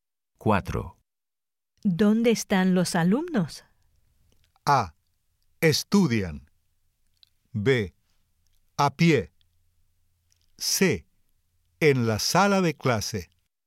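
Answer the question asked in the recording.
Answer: C: En la sala de clase.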